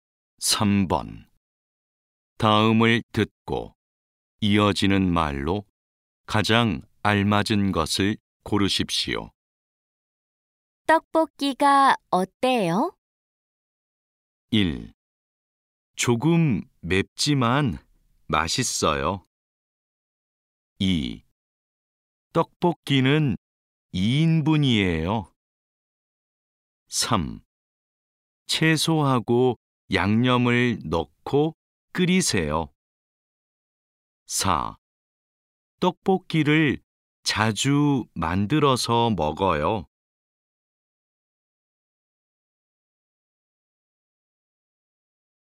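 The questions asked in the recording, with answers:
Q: 떡볶이가 어때요?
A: 1: 조금 맵지만 맛있어요.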